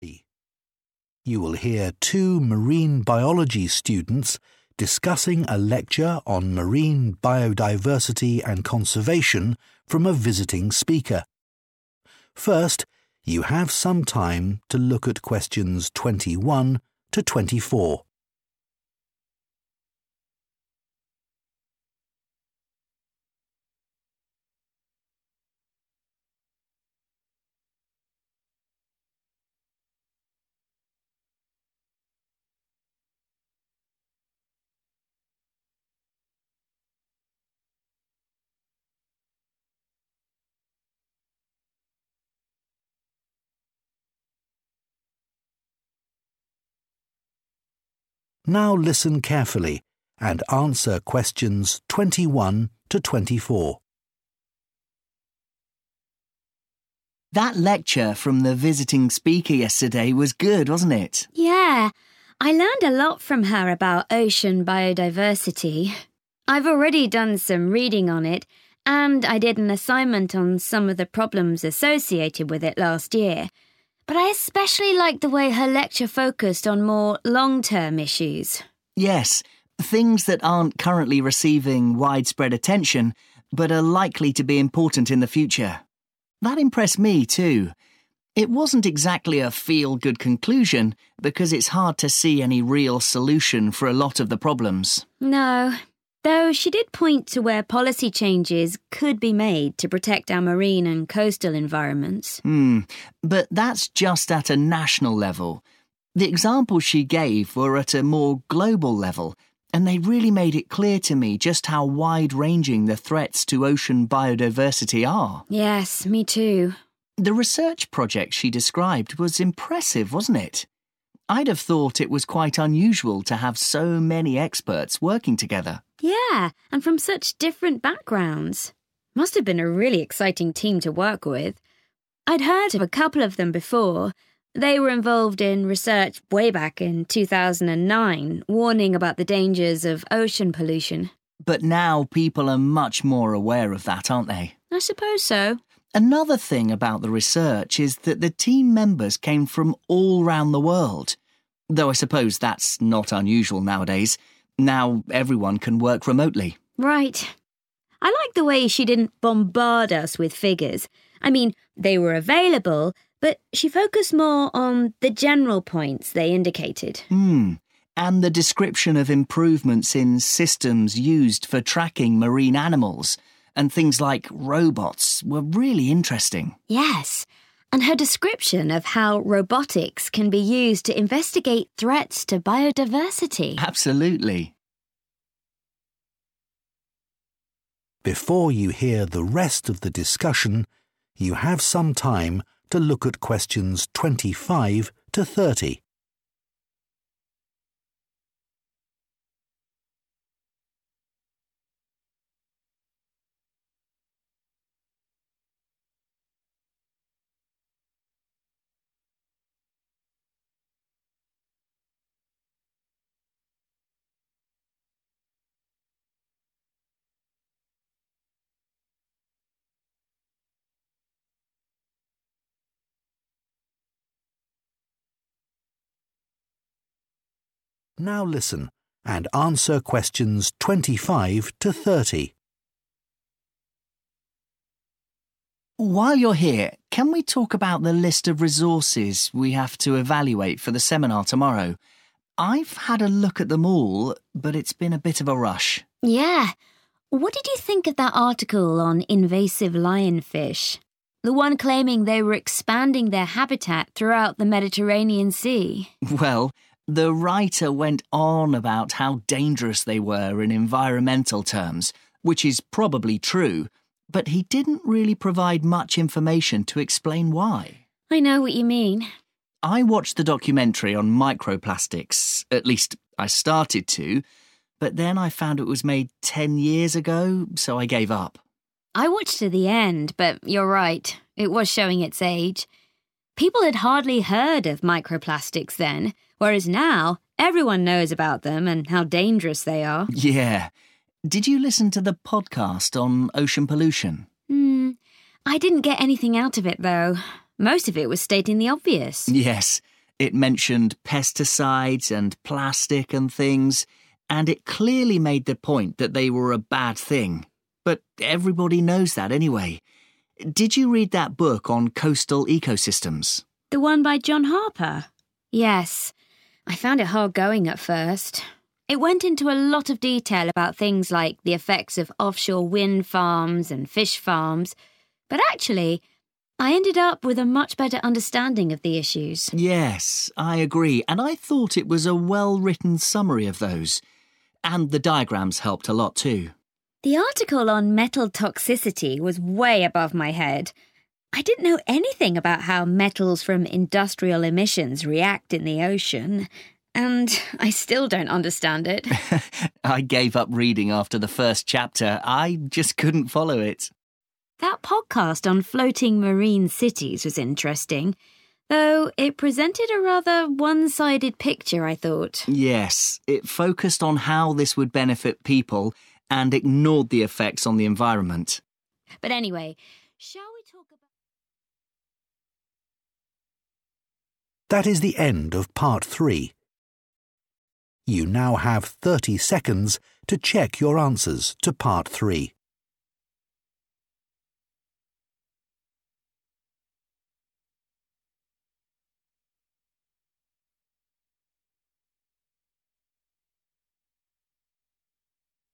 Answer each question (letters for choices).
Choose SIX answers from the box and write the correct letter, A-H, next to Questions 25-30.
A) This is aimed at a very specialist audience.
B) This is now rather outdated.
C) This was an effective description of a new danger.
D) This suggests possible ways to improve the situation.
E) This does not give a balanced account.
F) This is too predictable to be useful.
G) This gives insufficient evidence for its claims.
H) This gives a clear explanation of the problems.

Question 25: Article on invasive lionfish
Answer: G

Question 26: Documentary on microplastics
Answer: B

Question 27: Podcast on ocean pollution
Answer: F

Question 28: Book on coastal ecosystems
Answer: H

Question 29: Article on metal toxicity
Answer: A

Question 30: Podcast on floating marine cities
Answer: E

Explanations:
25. The correct answer is G because Phil mentions that the writer of the article says the lionfish are dangerous to the environment but fails to give enough details to explain the reasons. When someone makes a statement but does not provide enough information to support it, it is called giving 'insufficient evidence.' Lucy agrees with Phil, showing that they both feel the article is missing necessary proof for its claims.
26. The correct answer is B because both students agree that the resource is old. Phil explains he stopped watching it because it was 'made ten years ago,' which is a long time in scientific research. Lucy agrees with Phil's opinion, using the expression 'it was showing its age' to confirm that it is outdated.
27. The correct answer is F because both Phil and Lucy agree that the podcast was 'stating the obvious.' Information that is 'obvious' is predictable because you already expect to hear it. Phil adds that 'everybody knows' about the topics mentioned (like plastic being bad), which confirms that the podcast was too common or simple to be useful for their studies.
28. The correct answer is H because both students agree that the book was a helpful resource. Lucy says that after reading it, she gained a "better understanding" of the topics, even though it was detailed. Phil agrees, calling it a "well-written summary" and noting that the "diagrams" (drawings) were very helpful in making the information clear.
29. The correct answer is A because both students found the article extremely difficult to read. Lucy says it was 'way above my head,' which is an idiom meaning the information was too advanced for her. Phil says he 'couldn't follow it' and had to stop reading. These descriptions indicate that the article wasn't meant for general students but for a 'specialist audience' who already knows the complex chemistry and science involved.
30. The correct answer is E because the students describe the podcast as having a "one-sided picture." Lucy feels the information was limited to just one perspective, and Phil agrees, explaining that it "focused" only on how humans might benefit while it "ignored" the environment. Because it did not present both the pros and cons, it is not a balanced account.

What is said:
PHIL: That lecture from the visiting speaker yesterday was good, wasn't it?
LUCY: Yeah. I learned a lot from her about ocean biodiversity. I've already done some reading on it, and I did an assignment on some of the problems associated with it last year, but I especially liked the way her lecture focused on more long-term issues.
PHIL: Yes, things that aren't currently receiving widespread attention but are likely to be important in the future. That impressed me too. It wasn't exactly a feel-good conclusion because it's hard to see any real solution for a lot of the problems.
LUCY: No, though she did point to where policy changes could be made to protect our marine and coastal environments.
But that's just at a national level. The examples she gave were at a more global level, and they really made it clear to me just how wide-ranging the threats to ocean biodiversity are.
LUCY: Yes, me too.
PHIL: The research project she described was impressive, wasn't it? I'd have thought it was quite unusual to have so many experts working together.
LUCY: Yeah, and from such different backgrounds. Must have been a really exciting team to work with. I'd heard of a couple of them before - they were involved in research way back in 2009 warning about the dangers of ocean pollution.
PHIL: But now people are much more aware of that, aren't they?
LUCY: I suppose so.
PHIL: Another thing about the research is that the team members came from all round the world. Though I suppose that's not unusual nowadays, now everyone can work remotely.
LUCY: Right. I liked the way she didn't bombard us with figures - I mean, they were available, but she focused more on the general points they indicated.
And the description of improvements in systems used for tracking marine animals and things like robots were really interesting.
LUCY: Yes, and her description of how robotics can be used to investigate threats to biodiversity.
PHIL: Absolutely.
PHIL: While you're here, can we talk about the list of resources we have to evaluate for the seminar tomorrow. I've had a look at them all, but it's been a bit of a rush.
LUCY: Yeah. What did you think of that article on invasive lionfish? The one claiming they were expanding their habitat throughout the Mediterranean Sea.
PHIL: Well, the writer went on about how dangerous they were in environmental terms, which is probably true, but he didn't really provide much information to explain why.
LUCY: I know what you mean.
PHIL: I watched the documentary on microplastics, at least I started to, but then I found it was made ten years ago so I gave up.
LUCY: I watched to the end but you're right, it was showing its age. People had hardly heard of microplastics then, whereas now everyone knows about them and how dangerous they are.
PHIL: Yeah. Did you listen to the podcast on ocean pollution?
I didn't get anything out of it though. Most of it was stating the obvious.
PHIL: Yes, it mentioned pesticides and plastic and things, and it clearly made the point that they were a bad thing, but everybody knows that anyway. Did you read that book on coastal ecosystems?
LUCY: The one by John Harper? Yes, I found it hard going at first, it went into a lot of detail about things like the effects of offshore windfarms and fish farms, but actually I ended up with a much better understanding of the issues.
PHIL: Yes, I agree and I thought it was a well-written summary of those. And the diagrams helped a lot too.
LUCY: The article on metal toxicity was way above my head, I didn't know anything about how metals from industrial emissions react in the ocean... and I still don't understand it.
PHIL: I gave up reading after the first chapter - I just couldn't follow it.
LUCY: That podcast on floating marine cities was interesting, though it presented a rather one-sided picture, I thought.
PHIL: Yes, it focused on how this would benefit people and ignored the effects on the environment.
LUCY: But anyway, shall we ...